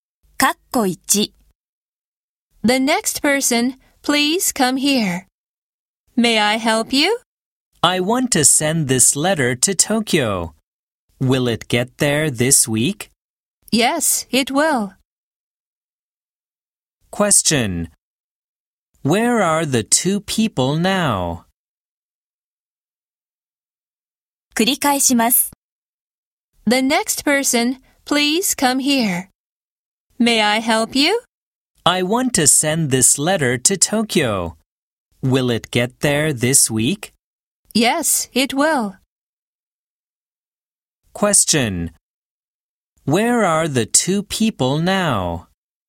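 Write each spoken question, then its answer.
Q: Where are the two people now?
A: At a post office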